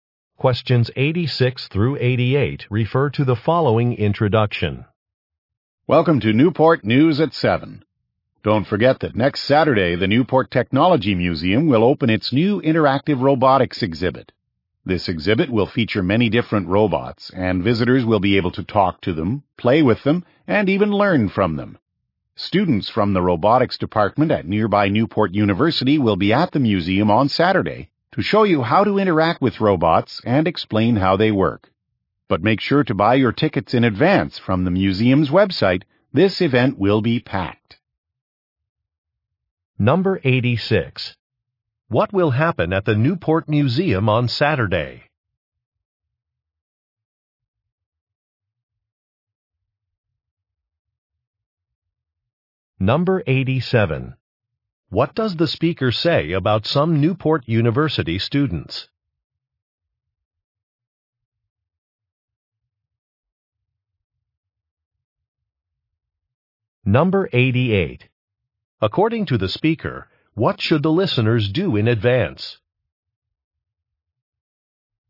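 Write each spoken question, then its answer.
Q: What will happen at the Newport Museum on Saturday?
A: A new interactive robotics exhibit will open

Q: What does the speaker say about some Newport University students?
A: They will show visitors how to interact with the robots

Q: According to the speaker, what should the listeners do in advance?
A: Buy tickets from the museum's website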